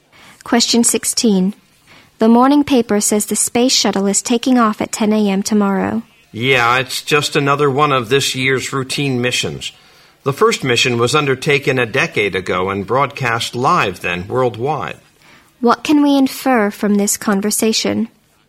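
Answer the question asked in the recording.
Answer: Space shuttle launches have become routine.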